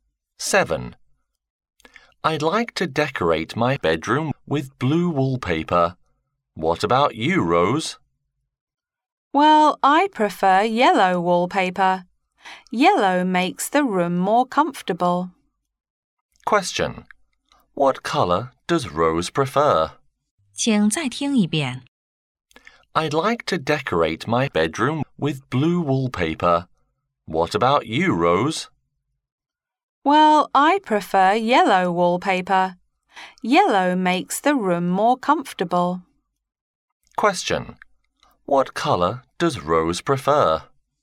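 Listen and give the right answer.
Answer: Yellow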